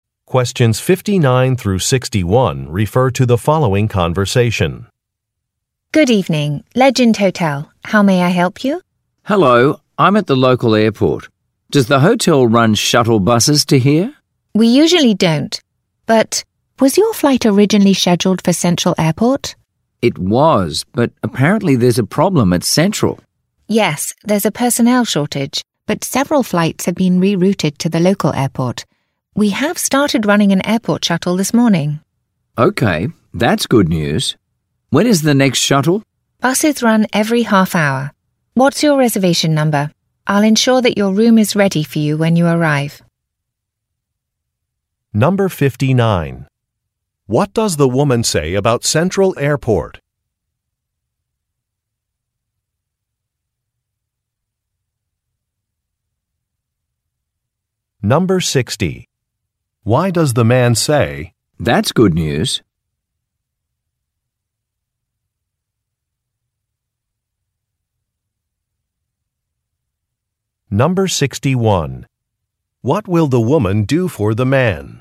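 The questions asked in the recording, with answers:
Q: What does the woman say about Central Airport?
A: It has a personnel shortage, so flights were rerouted

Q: Why does the man say, "That's good news"?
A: The hotel has started running a shuttle to the local airport

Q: What will the woman do for the man?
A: Make sure his room is ready when he arrives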